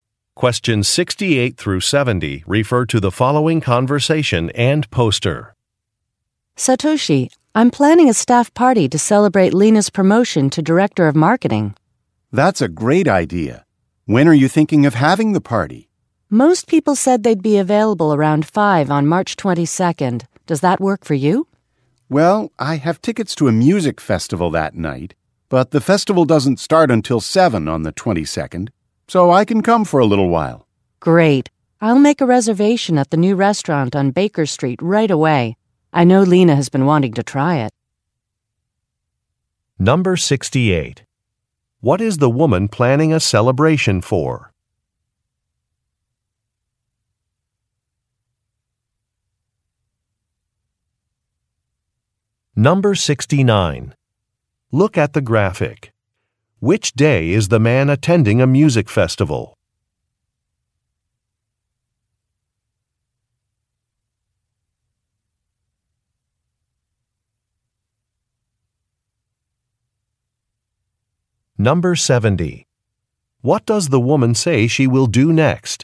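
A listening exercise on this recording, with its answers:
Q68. What is the woman planning a celebration for?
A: A colleague's promotion

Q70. What does the woman say she will do next?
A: Make a reservation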